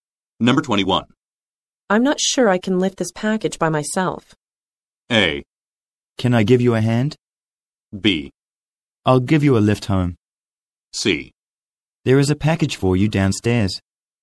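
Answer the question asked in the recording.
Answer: A: Can I give you a hand?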